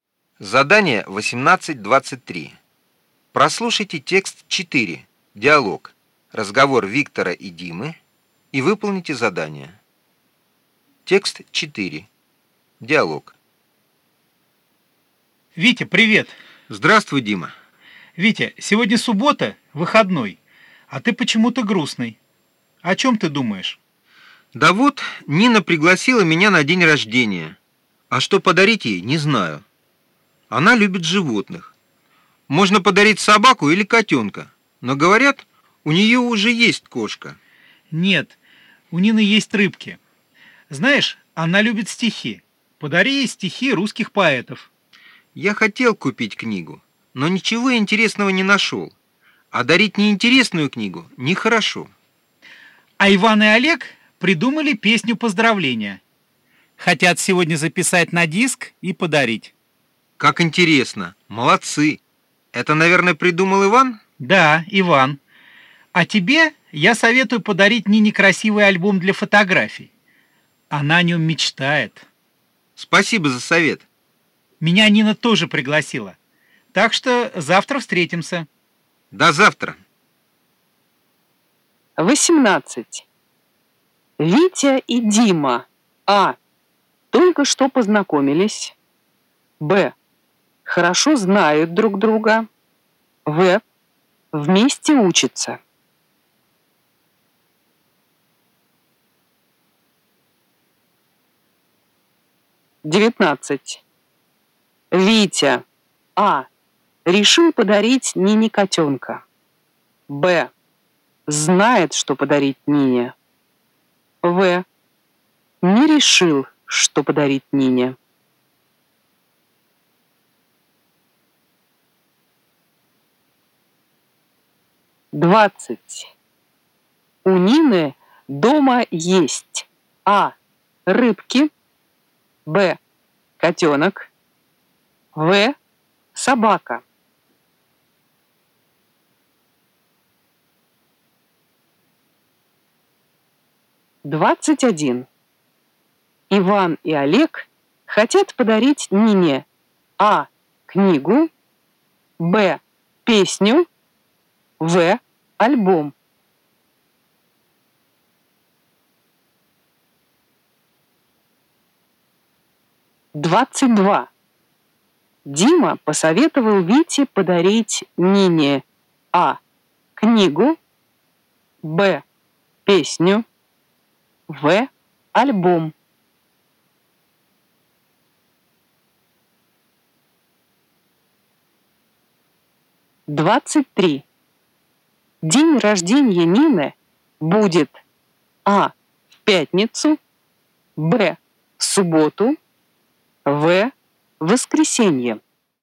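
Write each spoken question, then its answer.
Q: Витя. А. Решил подарить Нине котенка. Б. Знает, что подарить Нине. В. Не решил, что подарить Нине.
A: В: Не решил, что подарить Нине

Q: У Нины дома есть. А. Рыбки. Б. Котенок. В. Собака.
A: А: Рыбки

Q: Иван и Олег хотят подарить Нине А. книгу, Б. песню, В. альбом.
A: Б: песню

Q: Дима посоветовал Вите подарить Нине А. книгу, Б. песню, В. альбом.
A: В: альбом

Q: День рождения Нины будет А. в пятницу, Б. в субботу, В. воскресенье.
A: В: воскресенье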